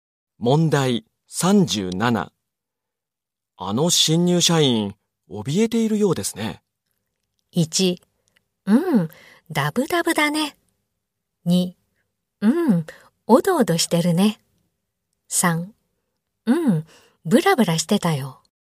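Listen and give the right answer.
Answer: 2: おどおどしてるね。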